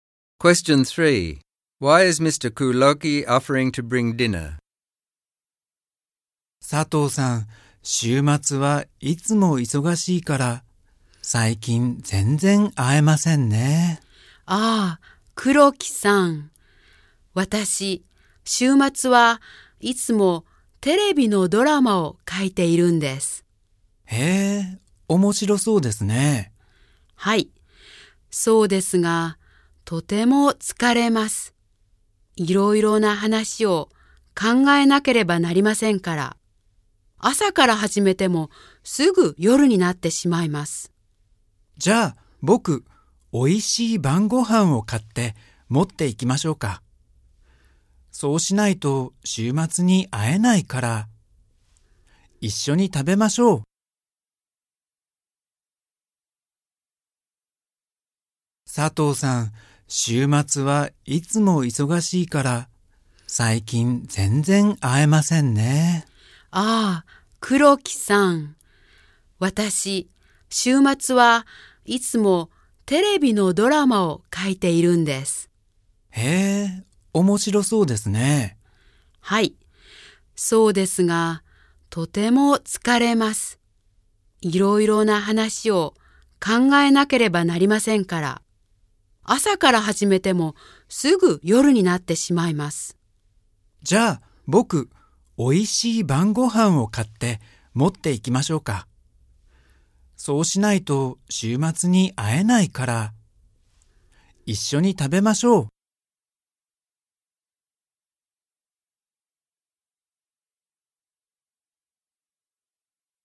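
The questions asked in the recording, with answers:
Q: Why is Mr. Kuroki offering to bring dinner?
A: Sato is busy writing TV dramas all weekend, so this is the only way they can meet on the weekend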